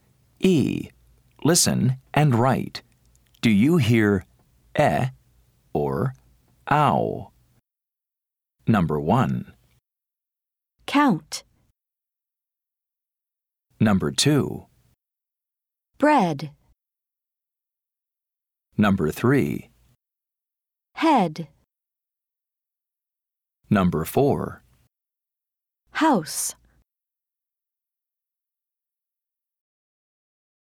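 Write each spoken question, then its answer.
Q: Do you hear eh or ow? Number 1. Count.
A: ow

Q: Number 2. Bread.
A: eh

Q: Number 3. Head.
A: eh

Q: Number 4. House.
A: ow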